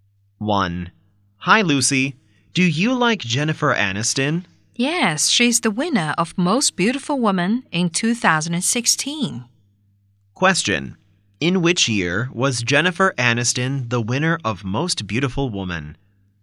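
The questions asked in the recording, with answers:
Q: In which year was Jennifer Aniston the winner of Most Beautiful Woman?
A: 2016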